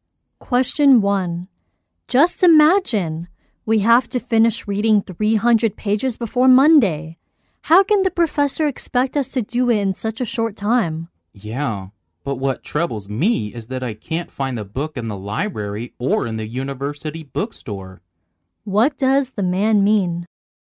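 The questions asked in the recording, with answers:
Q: What does the man mean?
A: He can't find the book he needs for the reading.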